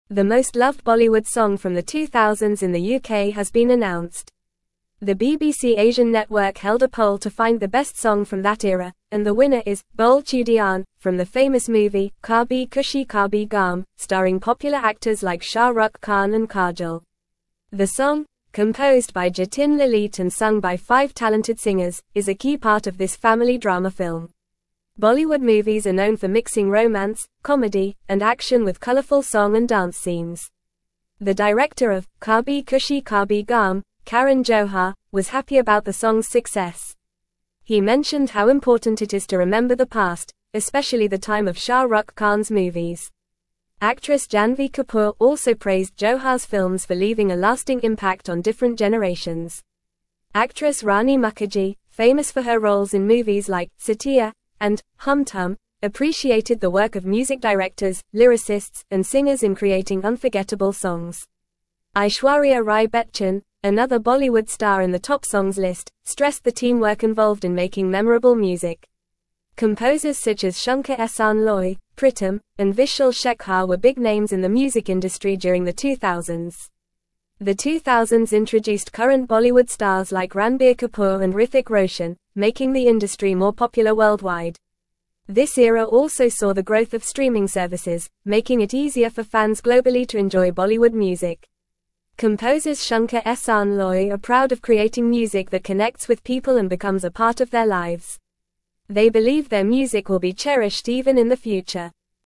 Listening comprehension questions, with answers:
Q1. The most loved (1)______ song from the 2000s in the UK has been announced.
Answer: Bollywood

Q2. The BBC Asian Network held a poll to find the best song from that era, and the winner is "Bole Chudiyan" from the famous movie "Kabhi (2)______ Kabhie Gham," (3)______ popular (4)______ like Shah Rukh Khan and Kajol.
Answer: Khushi

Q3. The BBC Asian Network held a poll to find the best song from that era, and the winner is "Bole Chudiyan" from the famous movie "Kabhi (2)______ Kabhie Gham," (3)______ popular (4)______ like Shah Rukh Khan and Kajol.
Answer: starring

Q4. The BBC Asian Network held a poll to find the best song from that era, and the winner is "Bole Chudiyan" from the famous movie "Kabhi (2)______ Kabhie Gham," (3)______ popular (4)______ like Shah Rukh Khan and Kajol.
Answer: actors

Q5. Bollywood movies are (5)______ for mixing romance, comedy, and action with colorful song and dance (6)______.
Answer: known

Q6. Bollywood movies are (5)______ for mixing romance, comedy, and action with colorful song and dance (6)______.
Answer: scenes

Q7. The director of "Kabhi Khushi Kabhie Gham," Karan Johar, was (7)______ about the song's success.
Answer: happy

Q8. Actress Rani (8)______, famous for her roles in movies like "Saathiya" and "Hum Tum," appreciated the work of music directors, lyricists, and (9)______ in (10)______ unforgettable songs.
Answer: Mukerji

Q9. Actress Rani (8)______, famous for her roles in movies like "Saathiya" and "Hum Tum," appreciated the work of music directors, lyricists, and (9)______ in (10)______ unforgettable songs.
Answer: singers

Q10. Actress Rani (8)______, famous for her roles in movies like "Saathiya" and "Hum Tum," appreciated the work of music directors, lyricists, and (9)______ in (10)______ unforgettable songs.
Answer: creating

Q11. (11)______ Rai Bachchan, another Bollywood star in the top songs list, stressed the teamwork involved in making memorable music.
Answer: Aishwarya

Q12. (12)______ such as Shankar-Ehsaan-Loy, Pritam, and Vishal-Shekhar were big names in the music industry during the 2000s.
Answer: Composers

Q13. The 2000s introduced current Bollywood (13)______ like Ranbir Kapoor and Hrithik Roshan, (14)______ the industry more (15)______ worldwide.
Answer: stars

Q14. The 2000s introduced current Bollywood (13)______ like Ranbir Kapoor and Hrithik Roshan, (14)______ the industry more (15)______ worldwide.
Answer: making

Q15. The 2000s introduced current Bollywood (13)______ like Ranbir Kapoor and Hrithik Roshan, (14)______ the industry more (15)______ worldwide.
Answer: popular

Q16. This era also saw the (16)______ of streaming services, making it easier for fans globally to enjoy Bollywood music.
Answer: growth

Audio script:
The most loved Bollywood song from the 2000s in the UK has been announced. The BBC Asian Network held a poll to find the best song from that era, and the winner is "Bole Chudiyan" from the famous movie "Kabhi Khushi Kabhie Gham," starring popular actors like Shah Rukh Khan and Kajol. The song, composed by Jatin-Lalit and sung by five talented singers, is a key part of this family drama film.
Bollywood movies are known for mixing romance, comedy, and action with colorful song and dance scenes. The director of "Kabhi Khushi Kabhie Gham," Karan Johar, was happy about the song's success. He mentioned how important it is to remember the past, especially the time of Shah Rukh Khan's movies. Actress Janhvi Kapoor also praised Johar's films for leaving a lasting impact on different generations.
Actress Rani Mukerji, famous for her roles in movies like "Saathiya" and "Hum Tum," appreciated the work of music directors, lyricists, and singers in creating unforgettable songs. Aishwarya Rai Bachchan, another Bollywood star in the top songs list, stressed the teamwork involved in making memorable music. Composers such as Shankar-Ehsaan-Loy, Pritam, and Vishal-Shekhar were big names in the music industry during the 2000s.
The 2000s introduced current Bollywood stars like Ranbir Kapoor and Hrithik Roshan, making the industry more popular worldwide. This era also saw the growth of streaming services, making it easier for fans globally to enjoy Bollywood music. Composers Shankar-Ehsaan-Loy are proud of creating music that connects with people and becomes a part of their lives. They believe their music will be cherished even in the future.

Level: Level 3